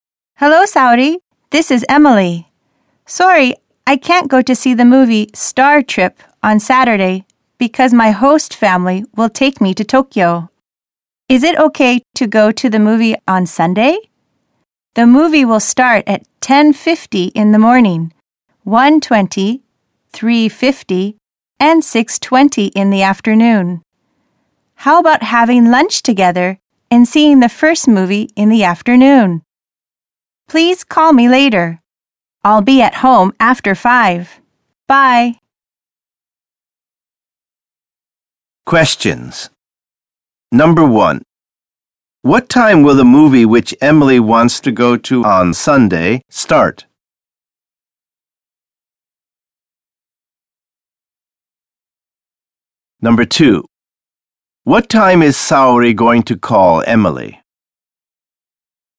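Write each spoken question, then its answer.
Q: What time will the movie which Emily wants to go to on Sunday start?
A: 1:20 in the afternoon

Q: What time is Saori going to call Emily?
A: After 5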